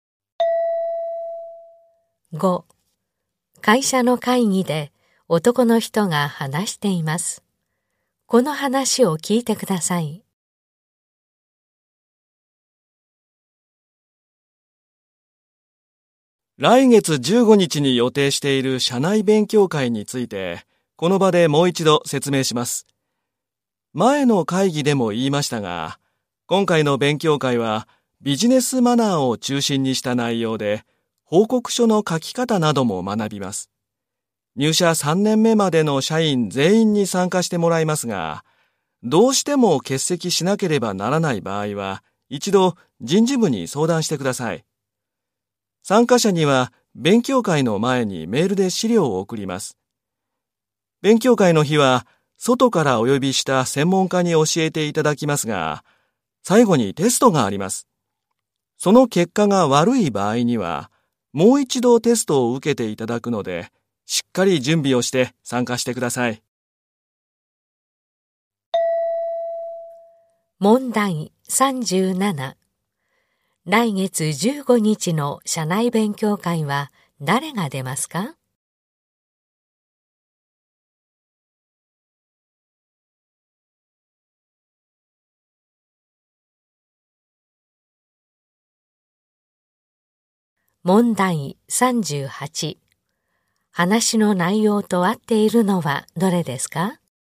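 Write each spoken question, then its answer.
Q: 来月15日の社内勉強会は誰が出ますか?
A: 入社3年目までの社員全員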